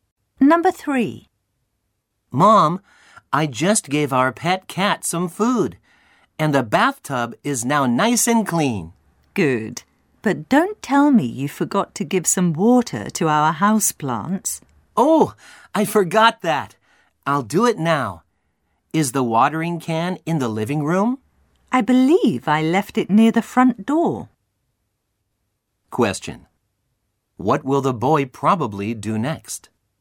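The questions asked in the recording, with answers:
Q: What will the boy probably do next?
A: Get the watering can near the front door and water the houseplants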